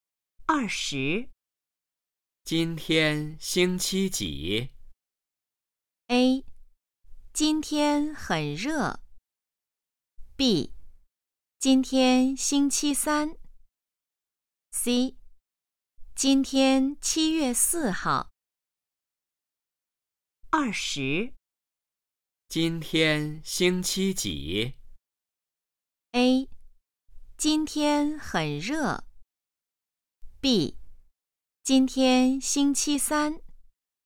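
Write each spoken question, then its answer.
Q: 今天星期几?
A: B: 今天星期三。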